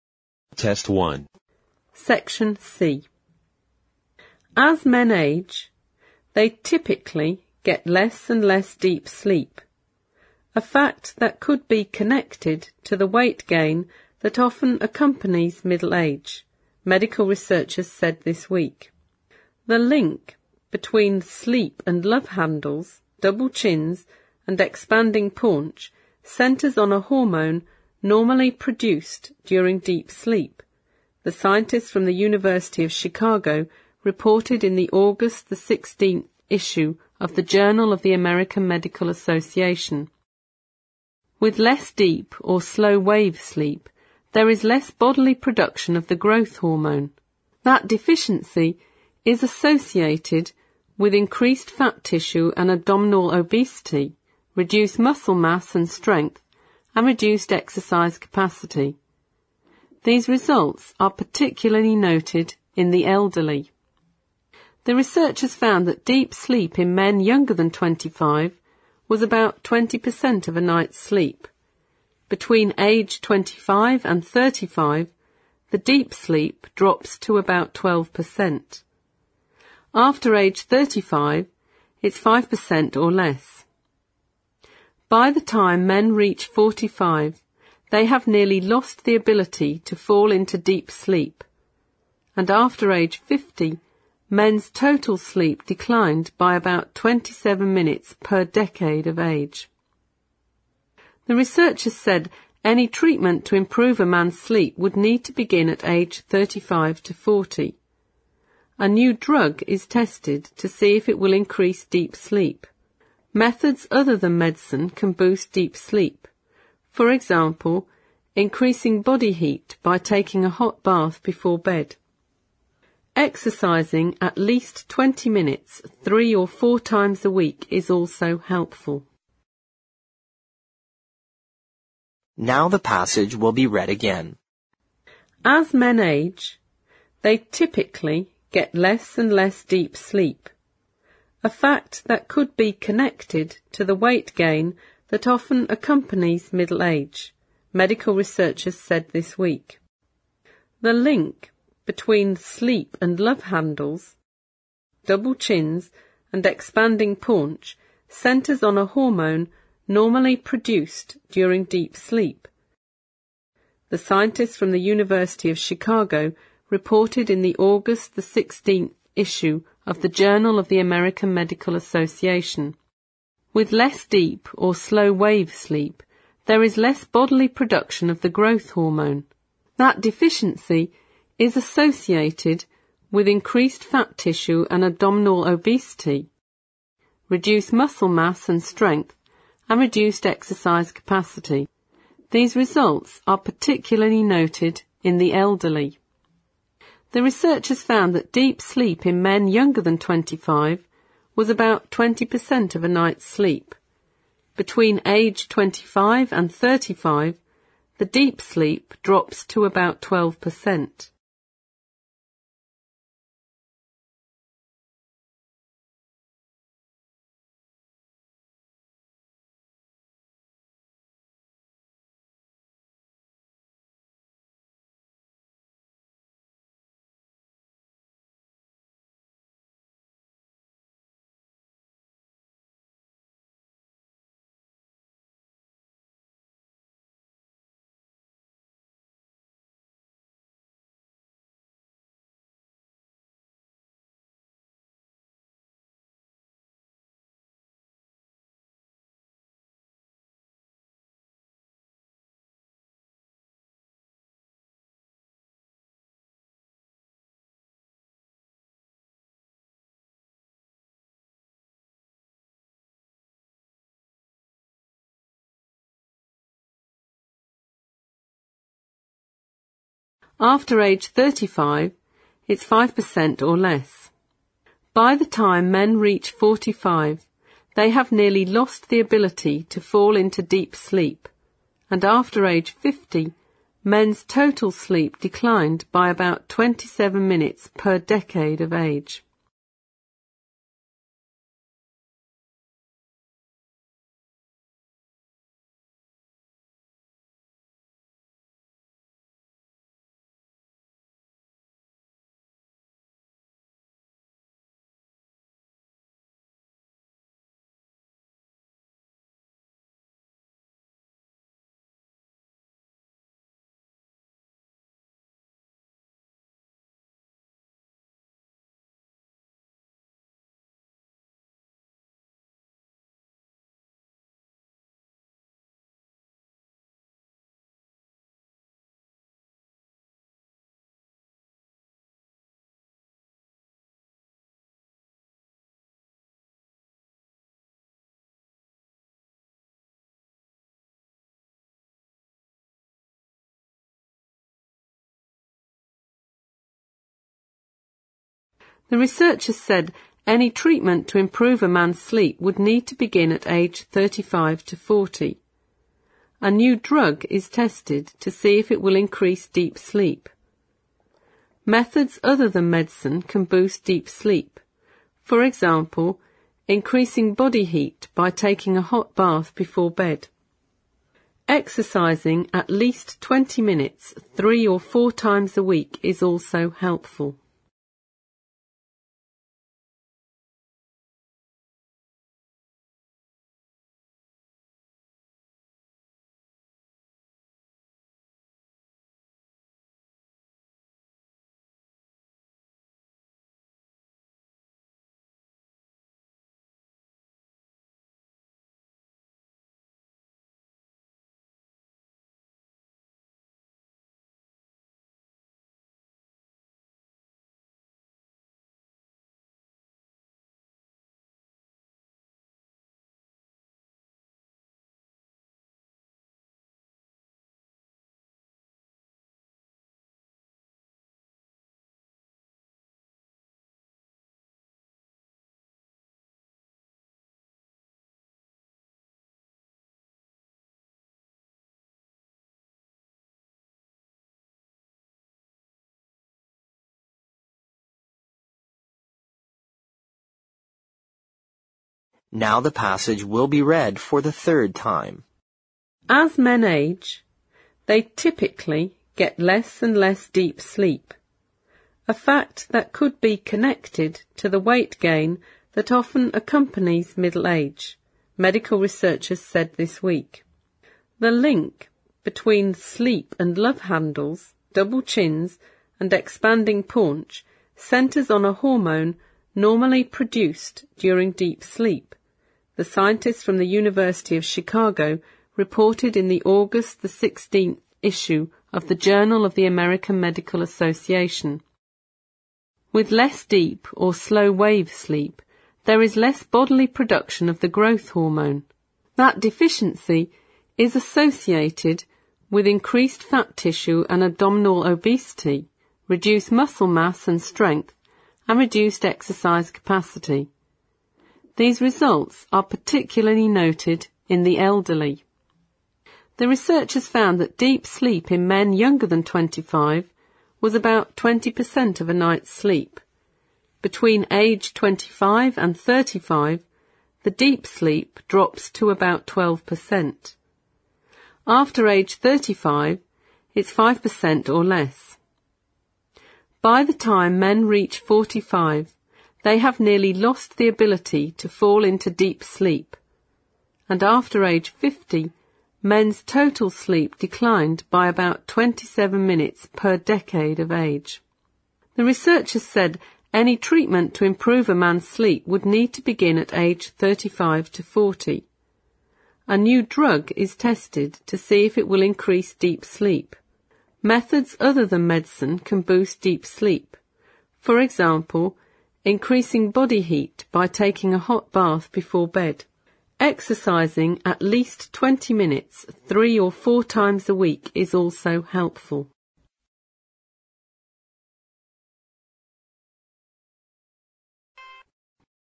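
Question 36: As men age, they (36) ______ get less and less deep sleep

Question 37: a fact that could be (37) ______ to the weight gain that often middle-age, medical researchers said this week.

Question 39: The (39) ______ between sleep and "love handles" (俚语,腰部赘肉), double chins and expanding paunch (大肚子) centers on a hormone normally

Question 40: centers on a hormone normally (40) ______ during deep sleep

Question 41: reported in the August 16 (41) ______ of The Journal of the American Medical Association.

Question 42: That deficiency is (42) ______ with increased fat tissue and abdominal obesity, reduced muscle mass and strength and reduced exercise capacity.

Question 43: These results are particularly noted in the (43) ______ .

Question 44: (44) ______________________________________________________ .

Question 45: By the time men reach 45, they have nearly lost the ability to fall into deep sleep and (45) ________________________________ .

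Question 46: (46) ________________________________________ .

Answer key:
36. typically
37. connected
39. link
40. produced
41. issue
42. associated
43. elderly
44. Between age 25 and 35, the deep sleep drops to about 12%
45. after age 50, men's total sleep declined by about 27 minutes per decade of age
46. Exercising at least 20 minutes 3 or 4 times a week is also helpful

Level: 四级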